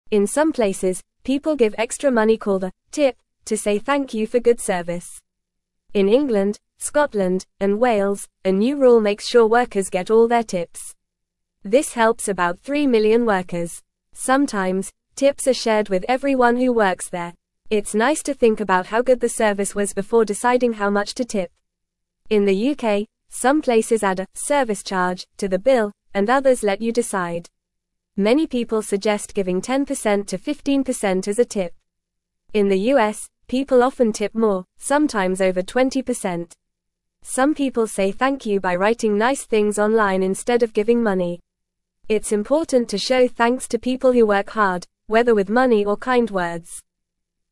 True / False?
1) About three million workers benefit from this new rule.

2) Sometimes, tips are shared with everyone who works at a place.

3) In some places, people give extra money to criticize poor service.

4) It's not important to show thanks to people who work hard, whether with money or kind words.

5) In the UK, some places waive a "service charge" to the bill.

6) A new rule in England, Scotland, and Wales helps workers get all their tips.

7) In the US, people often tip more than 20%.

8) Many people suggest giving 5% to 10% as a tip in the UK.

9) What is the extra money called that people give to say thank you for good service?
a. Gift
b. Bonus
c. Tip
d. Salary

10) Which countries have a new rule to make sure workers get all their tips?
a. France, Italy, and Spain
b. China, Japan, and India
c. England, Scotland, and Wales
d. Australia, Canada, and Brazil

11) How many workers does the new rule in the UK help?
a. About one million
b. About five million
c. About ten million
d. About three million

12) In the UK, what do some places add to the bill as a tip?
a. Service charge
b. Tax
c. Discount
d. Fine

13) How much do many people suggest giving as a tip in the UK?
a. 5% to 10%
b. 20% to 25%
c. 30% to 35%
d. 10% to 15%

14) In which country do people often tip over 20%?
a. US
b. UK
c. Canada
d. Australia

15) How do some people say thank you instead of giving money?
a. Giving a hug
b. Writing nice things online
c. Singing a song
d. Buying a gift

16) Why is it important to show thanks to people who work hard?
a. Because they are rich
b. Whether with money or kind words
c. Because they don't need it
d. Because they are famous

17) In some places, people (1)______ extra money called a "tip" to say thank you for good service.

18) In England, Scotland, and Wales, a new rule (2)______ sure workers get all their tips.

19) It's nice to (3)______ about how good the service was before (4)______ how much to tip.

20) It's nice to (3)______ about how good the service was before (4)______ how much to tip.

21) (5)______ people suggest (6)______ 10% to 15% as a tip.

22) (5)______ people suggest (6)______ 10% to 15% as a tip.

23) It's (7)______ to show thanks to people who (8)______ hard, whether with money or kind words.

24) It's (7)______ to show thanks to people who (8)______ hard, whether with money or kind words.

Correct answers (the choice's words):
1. True
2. True
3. False
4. False
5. False
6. True
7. True
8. False
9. Tip
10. England, Scotland, and Wales
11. About three million
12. Service charge
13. 10% to 15%
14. US
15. Writing nice things online
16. Whether with money or kind words
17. give
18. makes
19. think
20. deciding
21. Many
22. giving
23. important
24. work

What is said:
In some places, people give extra money called a "tip" to say thank you for good service. In England, Scotland, and Wales, a new rule makes sure workers get all their tips. This helps about three million workers. Sometimes, tips are shared with everyone who works there. It's nice to think about how good the service was before deciding how much to tip.
In the UK, some places add a "service charge" to the bill, and others let you decide. Many people suggest giving 10% to 15% as a tip. In the US, people often tip more, sometimes over 20%. Some people say thank you by writing nice things online instead of giving money. It's important to show thanks to people who work hard, whether with money or kind words.

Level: Level 1